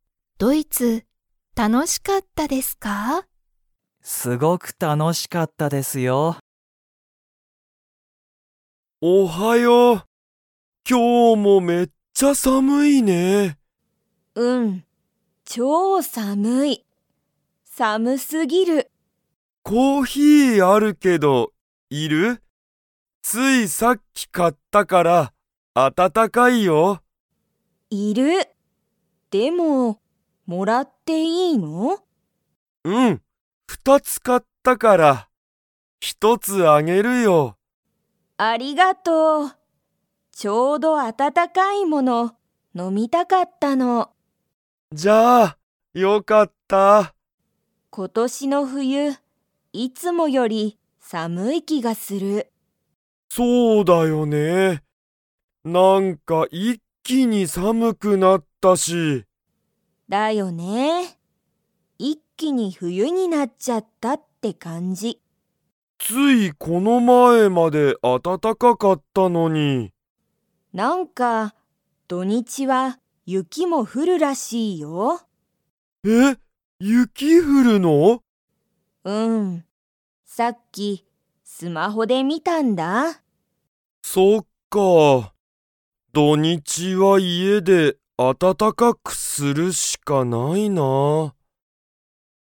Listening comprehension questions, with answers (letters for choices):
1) ヒロトはコーヒーをいくつ買かいましたか?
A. 一ひとつ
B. 二ふたつ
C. 三みっつ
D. 四よっつ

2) ついこの前まえまで 。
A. 暖あたたかかった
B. 寒さむかった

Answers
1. B
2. A

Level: Level 4